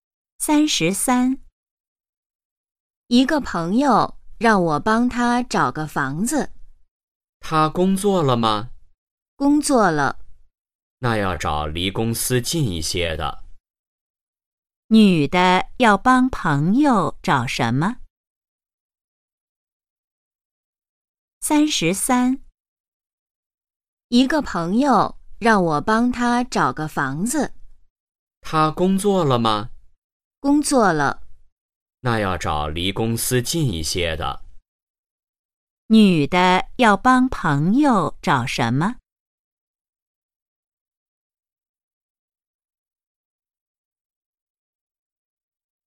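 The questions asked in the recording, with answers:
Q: 女的要帮朋友找什么?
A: 房子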